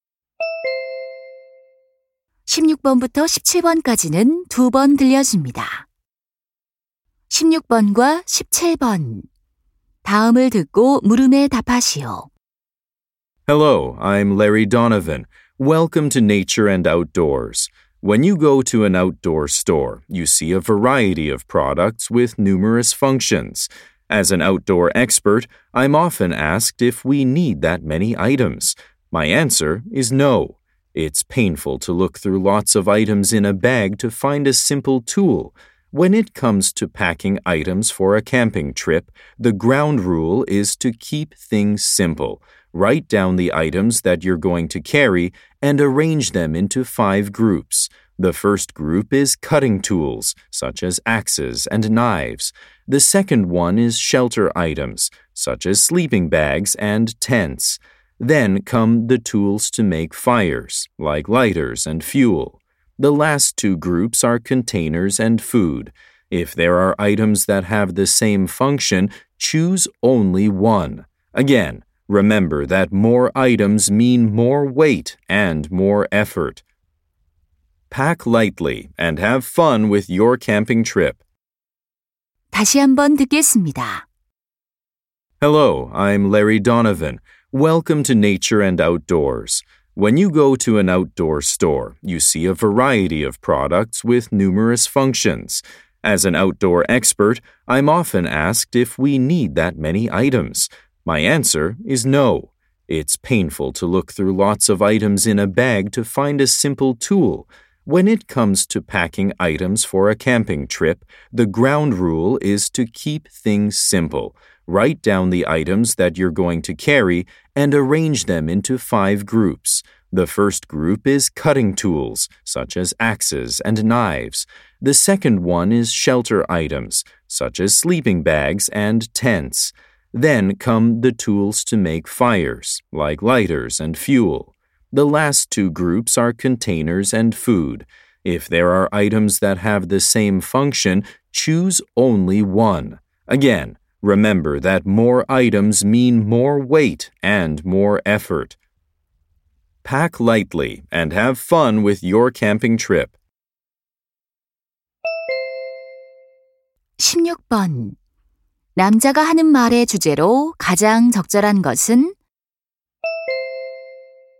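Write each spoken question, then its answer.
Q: 남자가 하는 말의 주제로 가장 적절한 것은?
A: 캠핑 짐을 간단하게 싸는 방법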